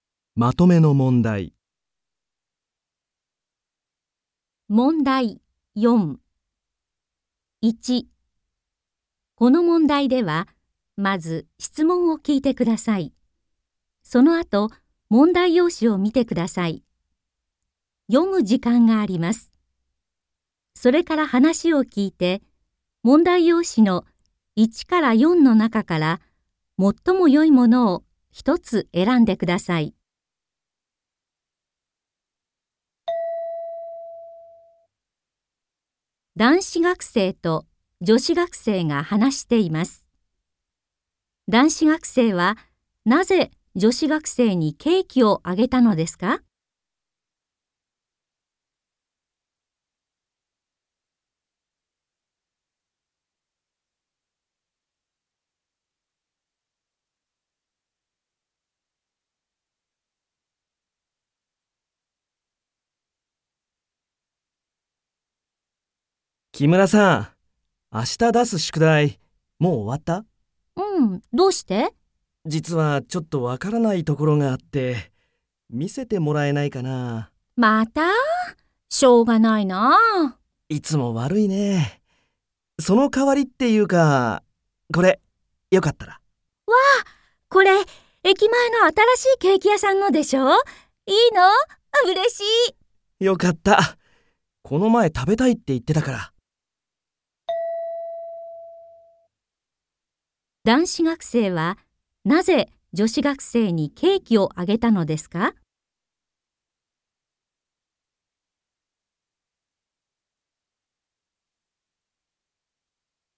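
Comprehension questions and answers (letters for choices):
この問題では、まず質問を聞いてください。そのあと、問題用紙を見てください。読む時間があります。それから話を聞いて、問題用紙の1から4の中から、最もよいものを一つえらんでください。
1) 男子学生はなぜ女子学生にケーキをあげたのですか。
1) 女子学生じょしがくせいに宿題を見せてもらうから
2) 男子学生だんしがくせいが宿題を見せてあげるから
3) 女子学生じょしがくせいはいつも成績せいせきが悪いから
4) 男子学生だんしがくせい成績せいせきがよかったから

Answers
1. 1

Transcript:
1.男子学生と女子学生が話しています。男子学生はなぜ女子学生にケーキをあげたのですか。
M: 木村さん。明日出す宿題、もう終わった?
F: うん。どうして?
M: 実はちょっとわからないところがあって...。見せてもらえないかなあ。
F: また? しょうがないなあ。
M: いつも悪いね。そのかわりっていうか... これ、よかったら。
F: わあ。これ駅前の新しいケーキ屋さんのでしょう。いいの? うれしい!
M: よかった。この前食べたいって言ってたから。

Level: N3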